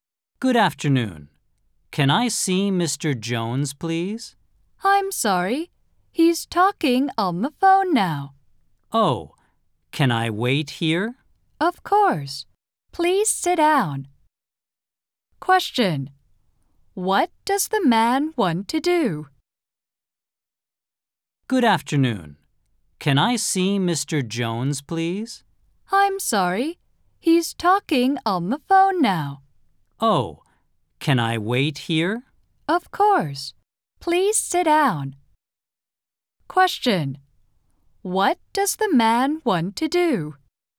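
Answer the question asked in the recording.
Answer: See Mr. Jones (he wants to wait there)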